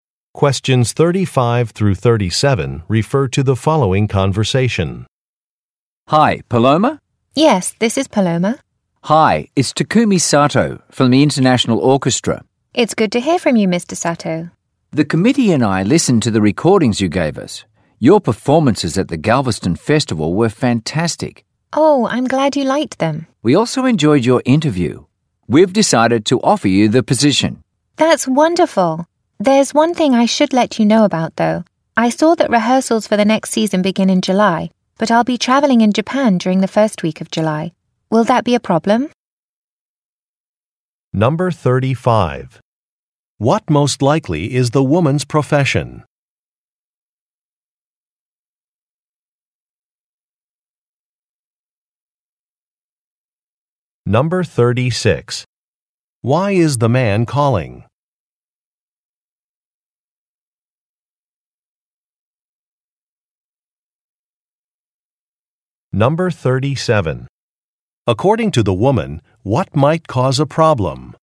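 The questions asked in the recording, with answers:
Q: What most likely is the woman's profession?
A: A musician

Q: Why is the man calling?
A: To offer her a position with the orchestra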